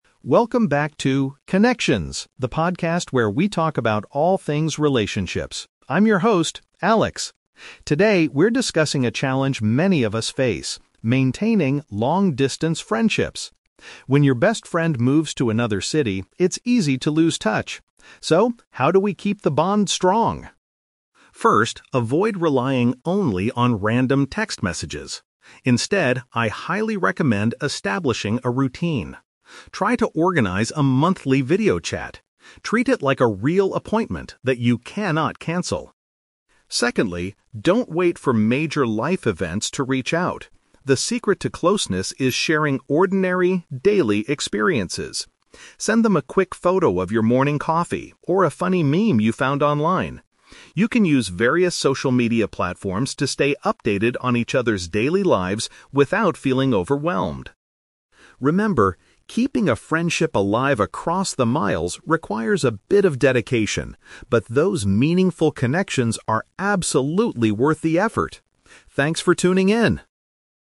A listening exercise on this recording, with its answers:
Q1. What is the speaker's first piece of advice?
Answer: To set up a regular online face-to-face meeting.

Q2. According to Alex, what kind of information should friends share?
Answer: Normal, everyday activities.

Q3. How does the host describe the process of maintaining a long-distance friendship?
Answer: It demands some commitment but is rewarding.

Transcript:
Alex (Podcast Host): Welcome back to 'Connections', the podcast where we talk about all things relationships. I'm your host, Alex. Today, we're discussing a challenge many of us face: maintaining long-distance friendships. When your best friend moves to another city, it's easy to lose touch. So, how do we keep the bond strong?
First, avoid relying only on random text messages. Instead, I highly recommend establishing a routine. Try to organize a monthly video chat. Treat it like a real appointment that you cannot cancel.
Secondly, don't wait for major life events to reach out. The secret to closeness is sharing ordinary, daily experiences. Send them a quick photo of your morning coffee or a funny meme you found online. You can use various social media platforms to stay updated on each other's daily lives without feeling overwhelmed.
Remember, keeping a friendship alive across the miles requires a bit of dedication, but those meaningful connections are absolutely worth the effort. Thanks for tuning in!